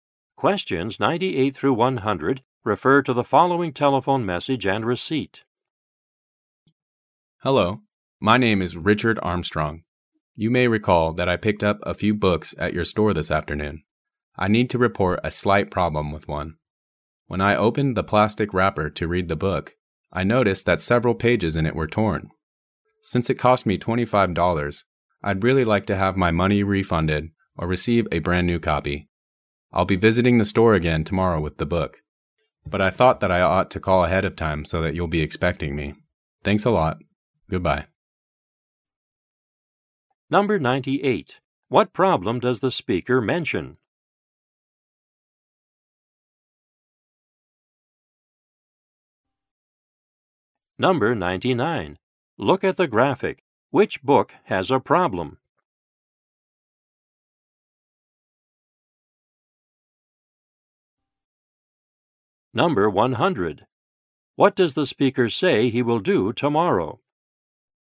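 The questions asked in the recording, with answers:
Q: What problem does the speaker mention?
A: Several pages of a book were torn

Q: What does the speaker say he will do tomorrow?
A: Visit the store with the book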